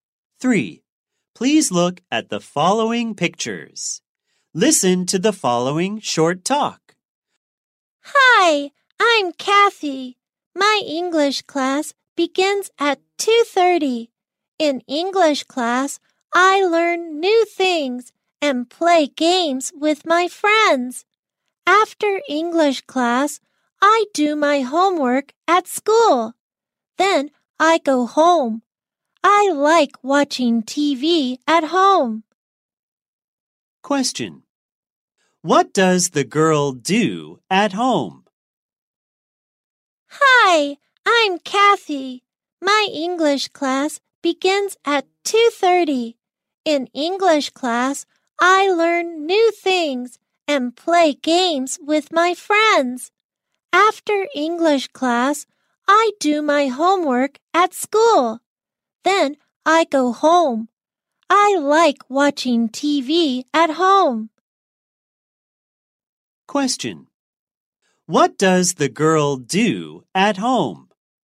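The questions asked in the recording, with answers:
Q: What does the girl do at home?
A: She watches TV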